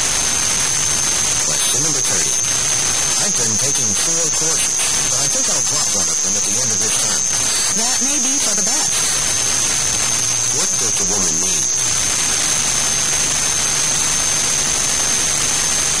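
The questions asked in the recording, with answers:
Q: What does the woman mean?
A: Dropping a course may be a good idea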